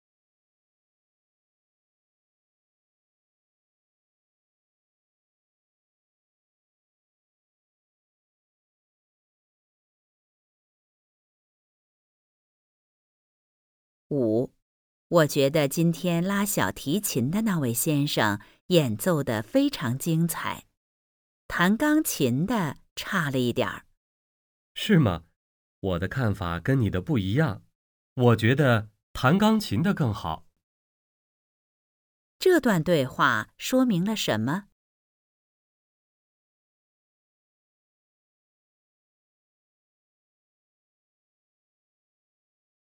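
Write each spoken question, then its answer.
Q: 这段对话说明了什么?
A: 两个人的看法不一样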